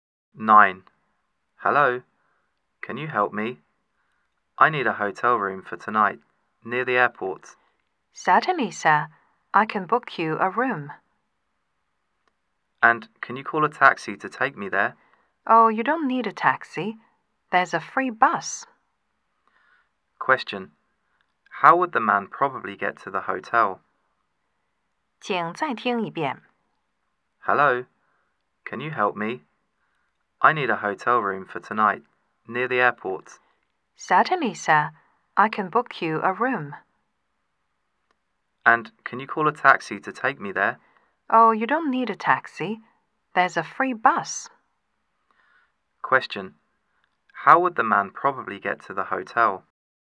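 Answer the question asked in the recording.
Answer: By the free bus.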